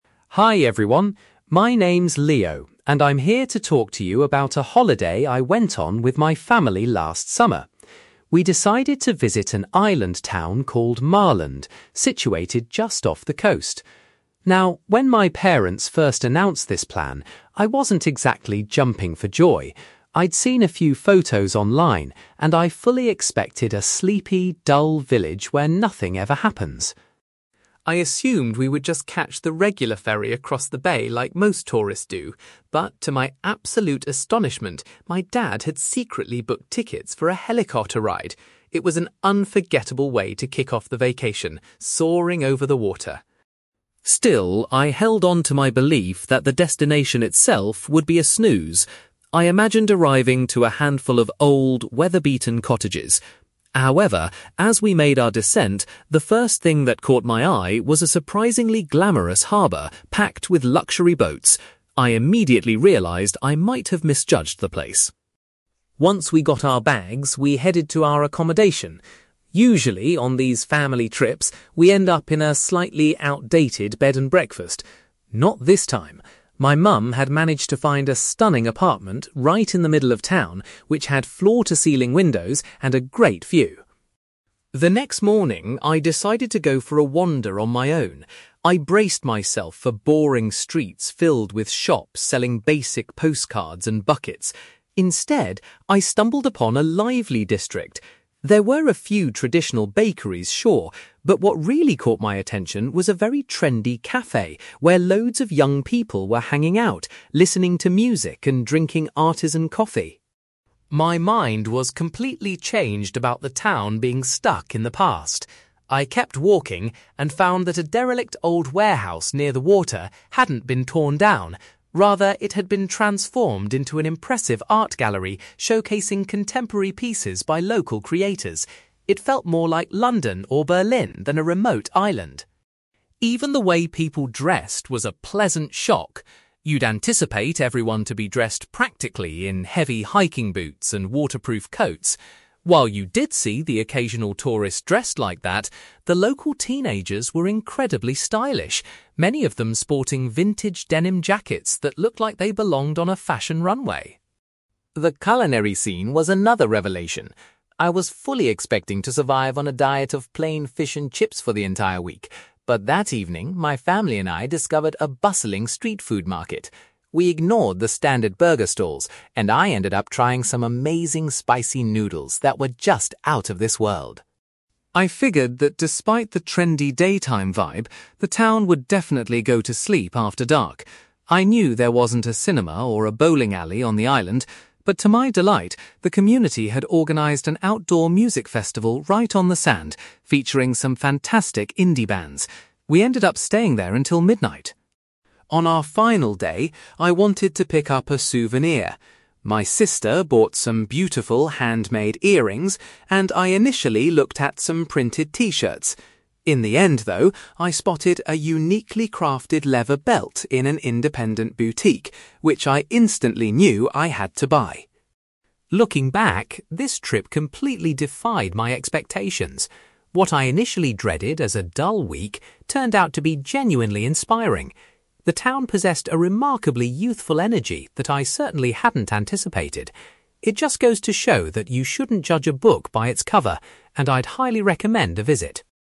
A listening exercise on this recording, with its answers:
You will hear a young man called Leo giving a presentation about his visit to an island town. For questions 9-18, complete the sentences with a word or short phrase.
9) Leo was amazed when his father arranged for them to travel to the island in a (9)........................... .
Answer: helicopter

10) Instead of seeing old cottages upon arrival, Leo immediately noticed a (10)........................... filled with expensive boats.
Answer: harbour

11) Leo's mother had booked a beautiful (11)........................... for the family to stay in during their holiday.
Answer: apartment

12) While exploring the town, Leo was particularly drawn to a (12)........................... full of young people.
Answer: cafe

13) Leo was impressed to discover that an old building had been converted into an (13)........................... .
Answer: art gallery

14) Leo observed that many of the local youths were wearing stylish (14)........................... .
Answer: denim jackets

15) Instead of having traditional food, Leo really enjoyed eating some (15)........................... at a street market.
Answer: spicy noodles

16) Leo was thrilled to attend a (16)........................... that was held on the beach in the evening.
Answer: music festival

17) As a souvenir of his trip, Leo decided to purchase a (17)........................... .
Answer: leather belt

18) Leo concluded that the town had a (18)........................... which surprised him.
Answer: youthful energy

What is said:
Leo: Hi everyone! My name is Leo, and I'm here to talk to you about a holiday I went on with my family last summer. We decided to visit an island town called Marland, situated just off the coast. Now, when my parents first announced this plan, I wasn't exactly jumping for joy. I'd seen a few photos online, and I fully expected a sleepy, dull village where nothing ever happens.
I assumed we would just catch the regular ferry across the bay like most tourists do. But, to my absolute astonishment, my dad had secretly booked tickets for a helicopter ride! It was an unforgettable way to kick off the vacation, soaring over the water.
Still, I held onto my belief that the destination itself would be a snooze. I imagined arriving to a handful of old, weather-beaten cottages. However, as we made our descent, the first thing that caught my eye was a surprisingly glamorous harbour packed with luxury boats. I immediately realised I might have misjudged the place.
Once we got our bags, we headed to our accommodation. Usually, on these family trips, we end up in a slightly outdated bed and breakfast. Not this time! My mum had managed to find a stunning apartment right in the middle of town, which had floor-to-ceiling windows and a great view.
The next morning, I decided to go for a wander on my own. I braced myself for boring streets filled with shops selling basic postcards and buckets. Instead, I stumbled upon a lively district. There were a few traditional bakeries, sure, but what really caught my attention was a very trendy cafe where loads of young people were hanging out, listening to music and drinking artisan coffee.
My mind was completely changed about the town being stuck in the past. I kept walking and found that a derelict old warehouse near the water hadn't been torn down; rather, it had been transformed into an impressive art gallery showcasing contemporary pieces by local creators. It felt more like London or Berlin than a remote island!
Even the way people dressed was a pleasant shock. You'd anticipate everyone to be dressed practically in heavy hiking boots and waterproof coats. While you did see the occasional tourist dressed like that, the local teenagers were incredibly stylish, many of them sporting vintage denim jackets that looked like they belonged on a fashion runway.
The culinary scene was another revelation. I was fully expecting to survive on a diet of plain fish and chips for the entire week. But that evening, my family and I discovered a bustling street food market. We ignored the standard burger stalls, and I ended up trying some amazing spicy noodles that were just out of this world.
I figured that despite the trendy daytime vibe, the town would definitely go to sleep after dark. I knew there wasn't a cinema or a bowling alley on the island. But to my delight, the community had organized an outdoor music festival right on the sand, featuring some fantastic indie bands. We ended up staying there until midnight!
On our final day, I wanted to pick up a souvenir. My sister bought some beautiful handmade earrings, and I initially looked at some printed t-shirts. In the end, though, I spotted a uniquely crafted leather belt in an independent boutique, which I instantly knew I had to buy.
Looking back, this trip completely defied my expectations. What I initially dreaded as a dull week turned out to be genuinely inspiring. The town possessed a remarkably youthful energy that I certainly hadn't anticipated. It just goes to show that you shouldn't judge a book by its cover, and I'd highly recommend a visit.

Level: B2